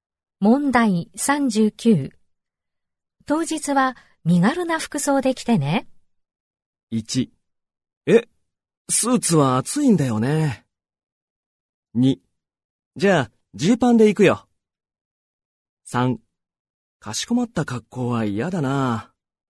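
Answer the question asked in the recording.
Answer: 2: じゃあ、ジーパンで行くよ。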